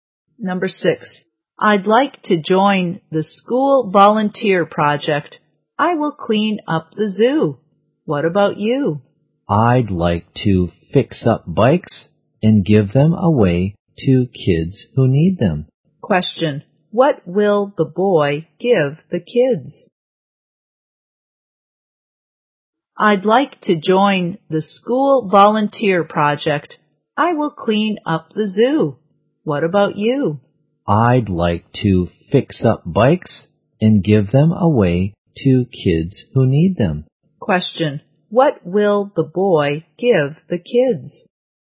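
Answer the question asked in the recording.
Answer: Bikes he fixed up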